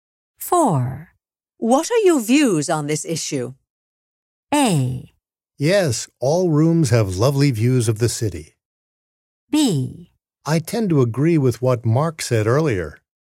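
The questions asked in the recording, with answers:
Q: What are your views on this issue?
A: B: I tend to agree with what Mark said earlier.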